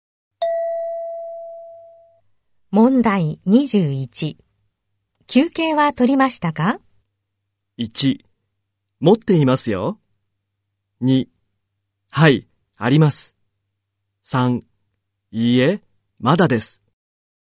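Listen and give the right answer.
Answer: 3: いいえ、まだです。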